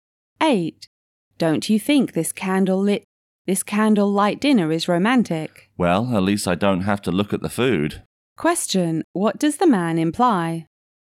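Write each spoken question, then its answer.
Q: What does the man imply?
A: The food doesn't look good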